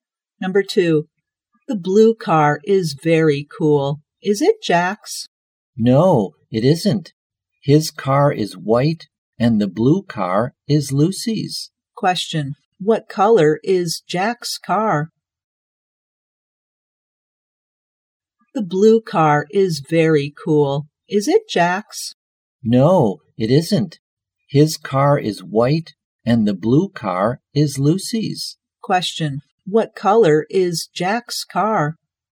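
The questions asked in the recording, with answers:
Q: What color is Jack's car?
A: White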